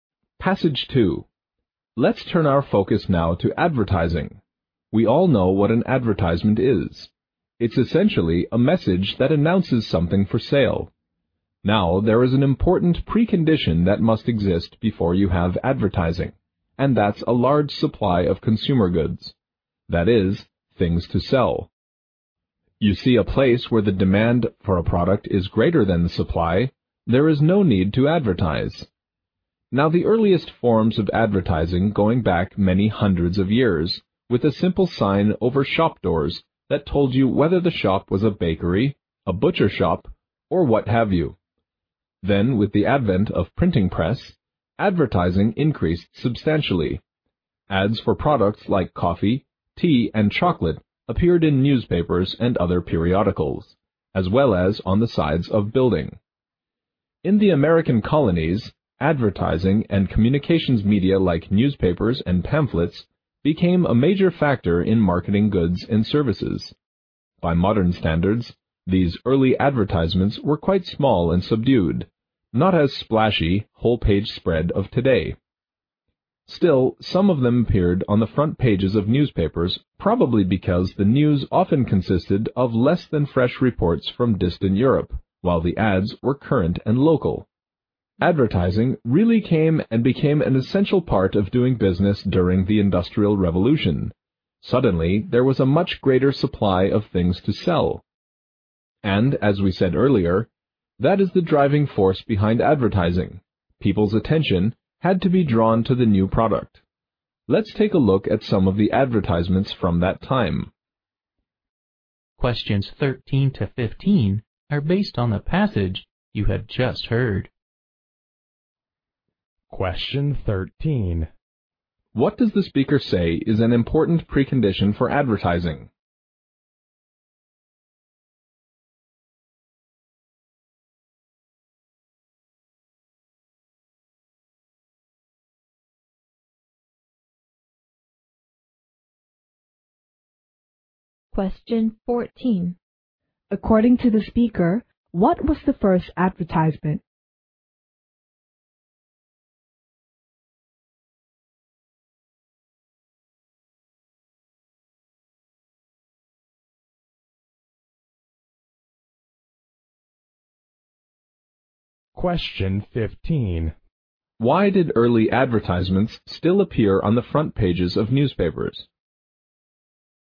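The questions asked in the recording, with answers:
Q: What does the speaker say is an important precondition for advertising?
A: A large supply of consumer goods

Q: According to the speaker, what was the first advertisement?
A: A simple sign over shop doors

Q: Why did early advertisements still appear on the front pages of newspapers?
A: Because the ads were current and local, while the news was often stale reports from distant Europe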